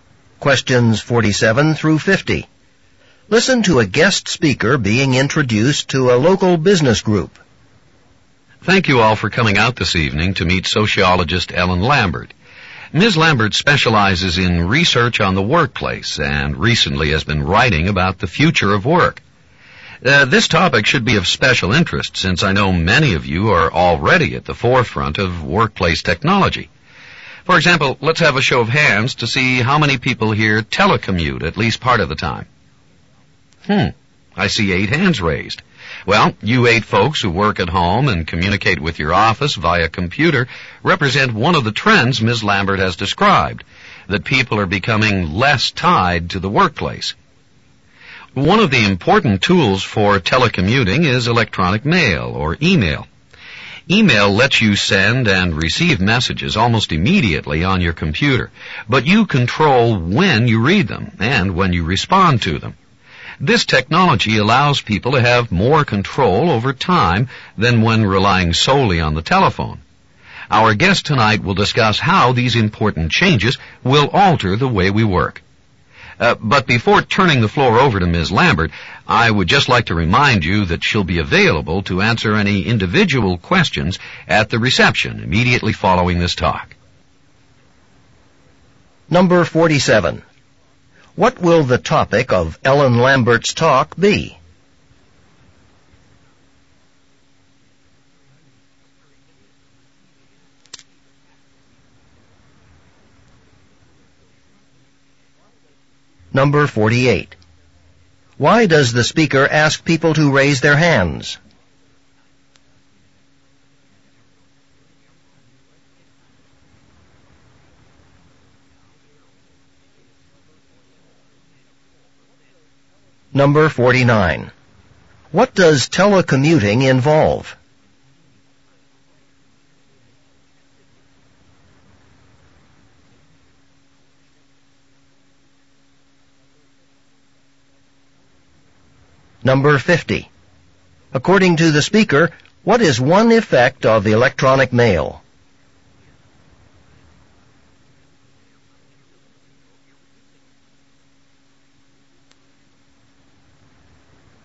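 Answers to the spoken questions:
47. The future of work
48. To see how many people in the audience telecommute
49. Working at home and communicating with the office by computer
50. People have more control over their time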